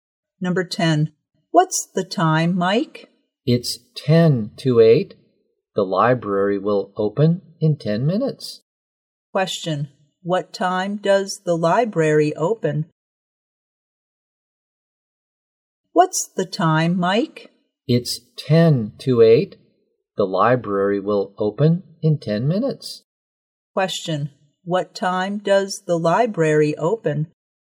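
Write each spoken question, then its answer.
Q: Question. What time does the library open?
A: At 8 o'clock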